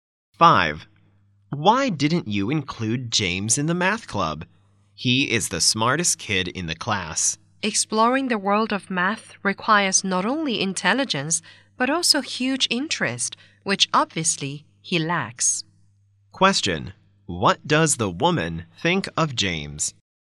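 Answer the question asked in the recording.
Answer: He is smart but lacks interest in math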